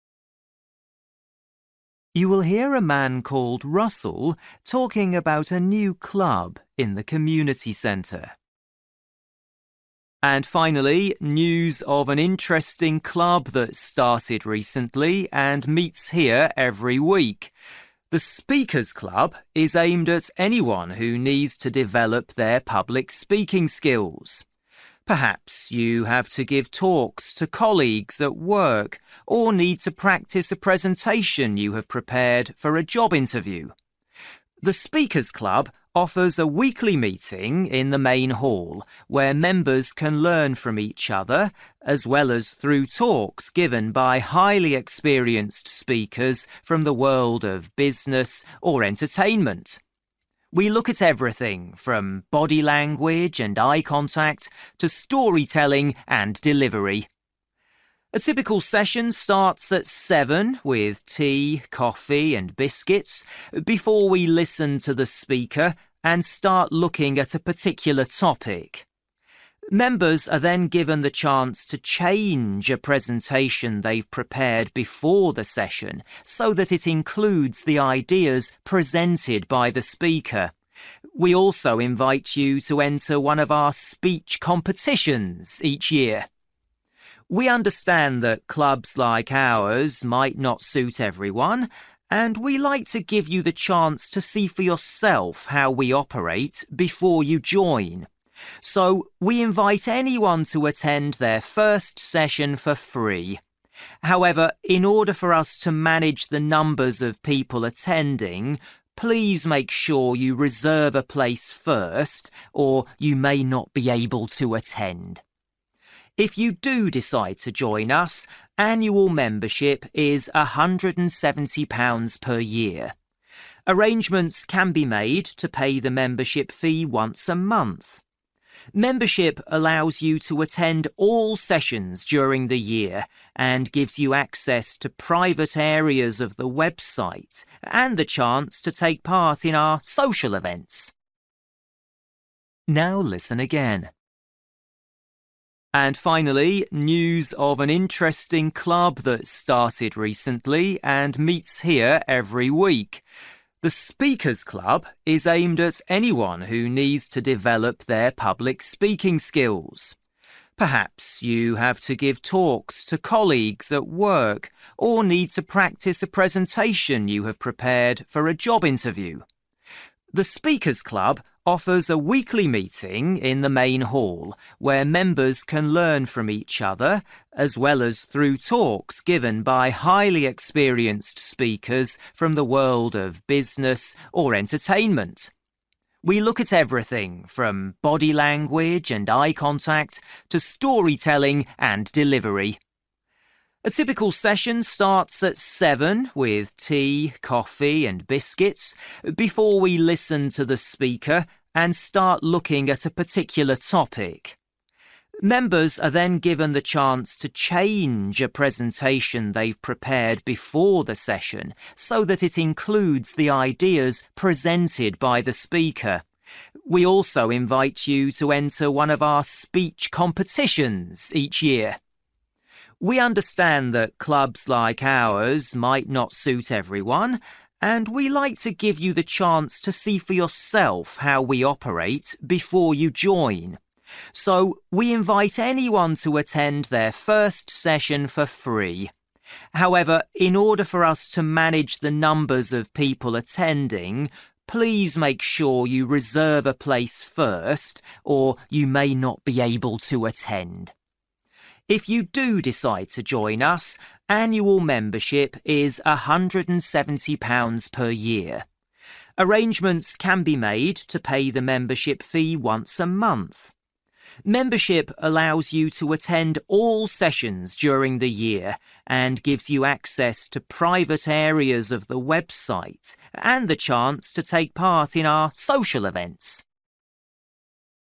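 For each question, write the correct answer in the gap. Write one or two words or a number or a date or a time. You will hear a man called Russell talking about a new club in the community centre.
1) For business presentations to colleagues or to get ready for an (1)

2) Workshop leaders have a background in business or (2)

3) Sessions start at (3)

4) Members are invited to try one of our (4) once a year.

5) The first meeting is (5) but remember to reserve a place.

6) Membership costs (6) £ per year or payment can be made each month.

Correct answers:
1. job interview
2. entertainment
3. 7
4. speech competitions
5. free
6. 170

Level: Luyện nghe trình độ B1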